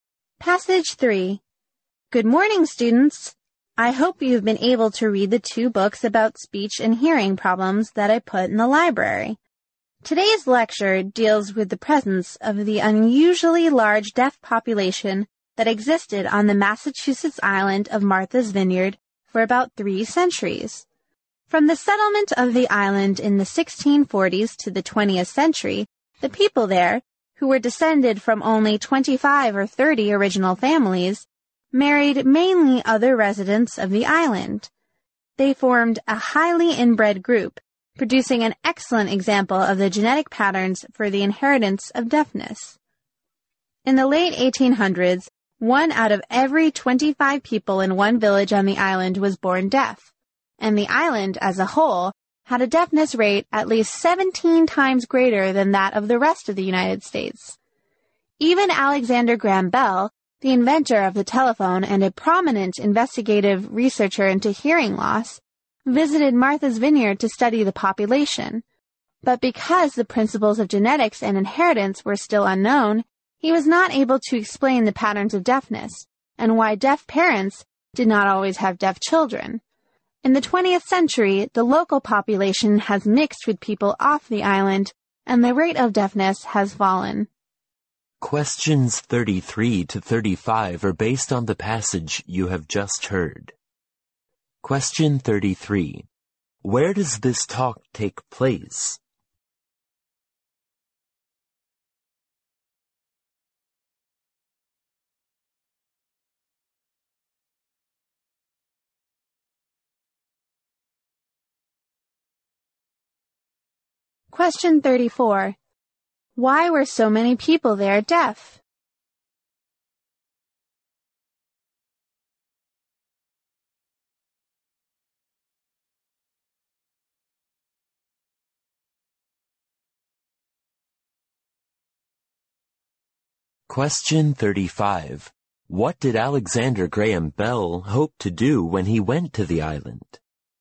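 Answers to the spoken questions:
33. In a classroom lecture
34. They married mainly other islanders and were highly inbred
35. Study the deaf population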